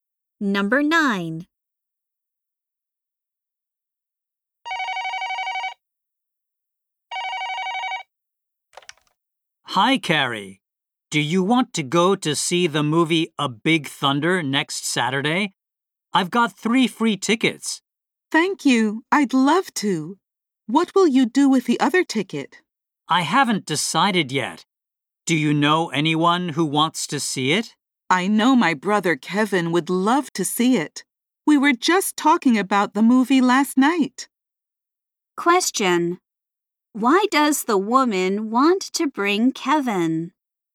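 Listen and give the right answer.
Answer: He would love to see the movie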